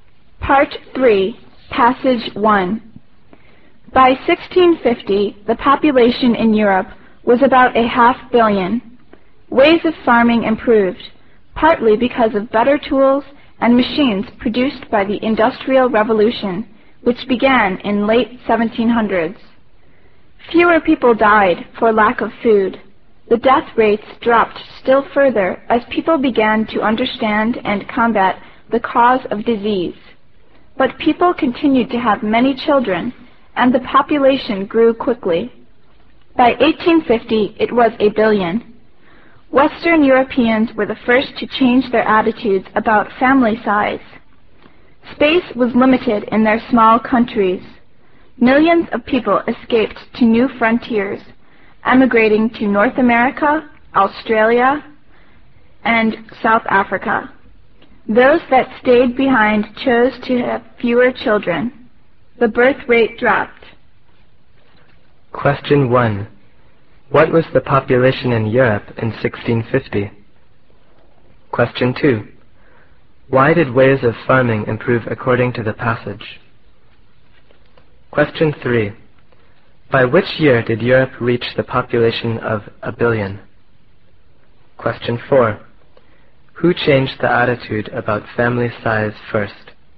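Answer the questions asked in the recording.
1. About half a billion
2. Because of better tools and machines from the Industrial Revolution
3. 1850
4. Western Europeans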